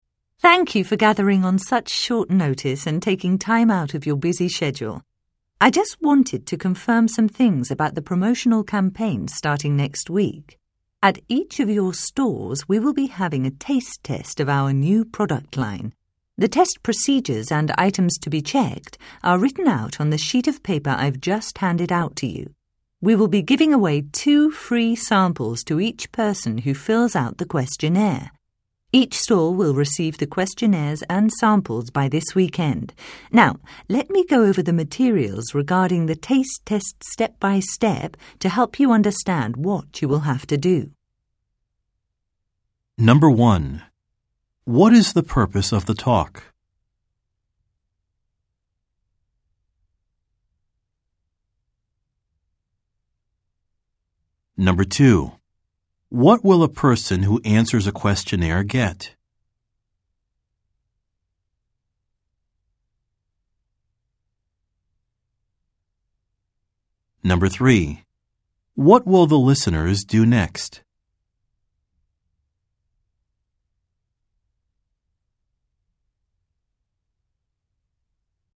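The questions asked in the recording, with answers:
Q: What is the purpose of the talk?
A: To confirm details of next week's promotional campaign

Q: What will a person who answers a questionnaire get?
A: Two free samples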